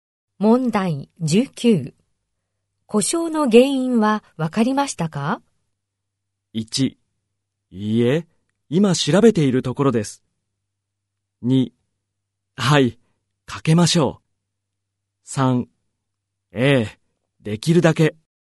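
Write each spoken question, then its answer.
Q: 故障の原因はわかりましたか?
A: 1: いいえ、今調べているところです。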